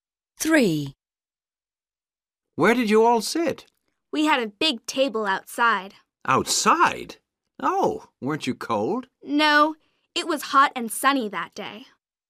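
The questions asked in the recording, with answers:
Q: Where did you all sit?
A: at a big table outside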